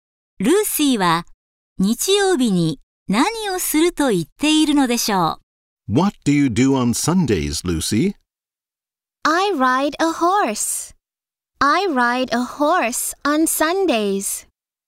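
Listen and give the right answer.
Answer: 馬に乗る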